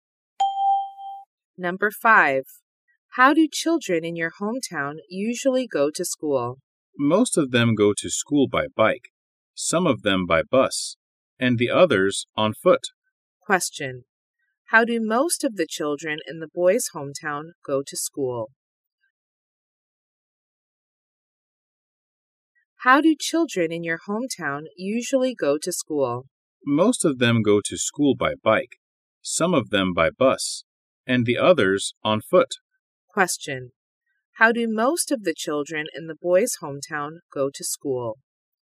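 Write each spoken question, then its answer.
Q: How do most of the children in the boys' hometown go to school?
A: By bike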